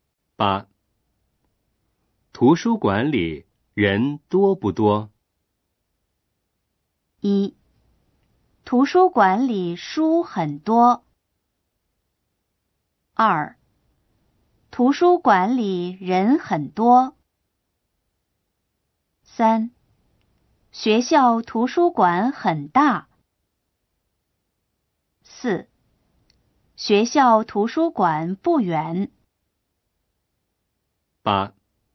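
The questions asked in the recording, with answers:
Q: 图书馆里人多不多?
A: 2: 图书馆里人很多。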